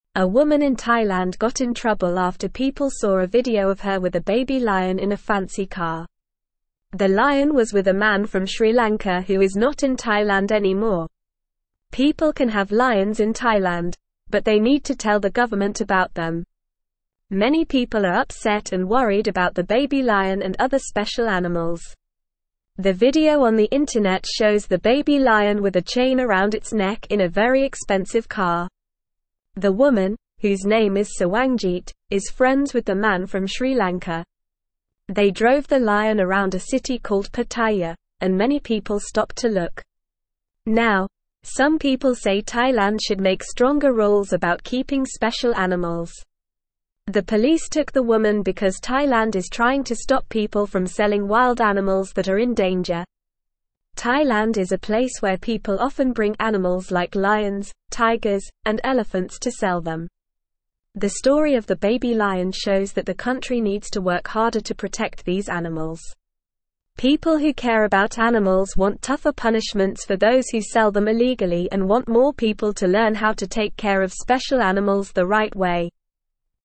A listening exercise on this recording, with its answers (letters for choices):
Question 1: A woman in (1)______ got in trouble after (2)______ saw a video of her with a baby lion in a fancy car.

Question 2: A woman in (1)______ got in trouble after (2)______ saw a video of her with a baby lion in a fancy car.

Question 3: People can have lions in Thailand, but they need to (3)______ the government about them.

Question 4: Many people are upset and worried about the (4)______ lion and other special animals.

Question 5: The video on the (5)______ shows the baby lion with a chain around its neck in a very expensive car.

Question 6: The woman, whose name is Sawangjit, is friends with the man from Sri (6)______.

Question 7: They drove the lion around a city called Pattaya, and many people stopped to (7)______.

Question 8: The police took the woman because Thailand is (8)______ to stop people from selling wild animals that are in danger.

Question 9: Thailand is a (9)______ where people often bring animals like lions, tigers, and elephants to sell them.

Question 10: The story of the baby lion shows that the country needs to (10)______ harder to protect these animals.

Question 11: People who care about animals (11)______ tougher punishments for those who sell them illegally and want more people to (12)______ how to take care of special animals the right way.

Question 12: Why did the woman in Thailand get in trouble?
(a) She was friends with a man from Sri Lanka.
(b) She drove the lion around a city called Pattaya.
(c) She was seen with a baby lion in a fancy car.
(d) She did not tell the government about the lion.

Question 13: What do people need to do if they want to have lions in Thailand?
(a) They need to drive them around in fancy cars.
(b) They need to be friends with people from Sri Lanka.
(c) They need to tell the government about them.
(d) They need to sell them illegally.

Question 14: What did the video on the internet show?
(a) The baby lion with a chain around its neck in a fancy car.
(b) The woman named Sawangjit driving a very expensive car.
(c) People stopping to look at the baby lion in Pattaya.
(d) The man from Sri Lanka playing with the baby lion.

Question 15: Why did the police take the woman?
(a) Thailand is trying to stop people from selling wild animals.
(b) The woman did not tell the government about the lion.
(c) The woman was friends with a man from Sri Lanka.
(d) The woman drove the lion around a city called Pattaya.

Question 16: What does the story of the baby lion show?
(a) People often bring animals like lions, tigers, and elephants to Thailand.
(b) The woman named Sawangjit wants to sell the baby lion.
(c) The man from Sri Lanka is not in Thailand anymore.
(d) Thailand needs to work harder to protect special animals.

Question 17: What do people want more of?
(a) Wild animals to be sold in Thailand.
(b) People to learn how to take care of special animals.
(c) Lions, tigers, and elephants in Thailand.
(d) All of the below.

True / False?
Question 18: Thailand wants to encourage people to sell wild animals that are in danger, so they took the woman into custody.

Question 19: They parked the lion around a city called Pattaya, and few people stopped to look.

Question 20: The woman's name is Sawangjit, and she is friends with the man from Sri Lanka.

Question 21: In Thailand, people cannot have lions, and they don't need to tell the government about them.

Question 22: The video on the internet shows the baby lion with a chain around its neck in a very expensive car.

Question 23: A woman in Thailand got in trouble for having a baby lion in her fancy car.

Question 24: The baby lion was with a woman from Sri Lanka, and she is not in Thailand anymore.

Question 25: Many people are upset and worried about the baby lion and other special animals.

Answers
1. Thailand
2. people
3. tell
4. baby
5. internet
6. Lanka
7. look
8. trying
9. place
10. work
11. learn
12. c
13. c
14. a
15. a
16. d
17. b
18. False
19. False
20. True
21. False
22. True
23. True
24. False
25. True

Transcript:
A woman in Thailand got in trouble after people saw a video of her with a baby lion in a fancy car. The lion was with a man from Sri Lanka who is not in Thailand anymore. People can have lions in Thailand, but they need to tell the government about them.
The woman, whose name is Sawangjit, is friends with the man from Sri Lanka. They drove the lion around a city called Pattaya, and many people stopped to look. Now, some people say Thailand should make stronger rules about keeping special animals.
The police took the woman because Thailand is trying to stop people from selling wild animals that are in danger. Thailand is a place where people often bring animals like lions, tigers, and elephants to sell them. The story of the baby lion shows that the country needs to work harder to protect these animals. People who care about animals want tougher punishments for those who sell them illegally and want more people to learn how to take care of special animals the right way.

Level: Level 2